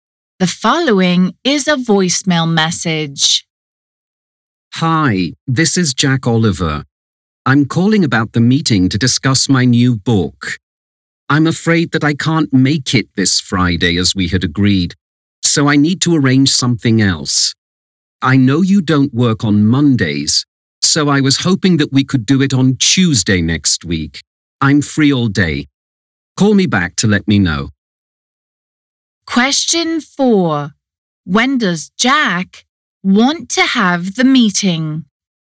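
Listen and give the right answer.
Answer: Next Tuesday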